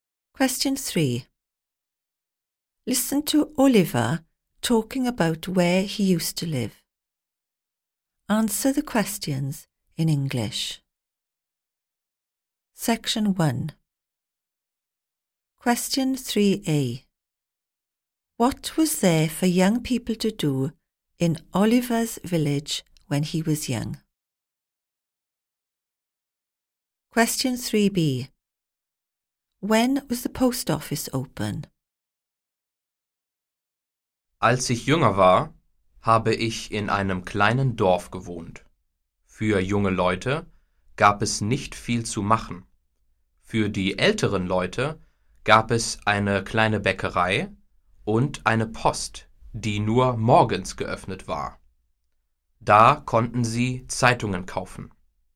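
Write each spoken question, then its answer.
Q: What was there for young people to do in Oliver's village when he was young?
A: Not much

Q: When was the post office open?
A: Only in the mornings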